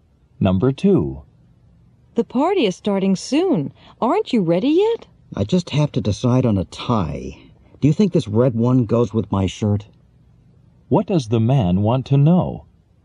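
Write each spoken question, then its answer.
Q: What does the man want to know?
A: Whether the red tie goes with his shirt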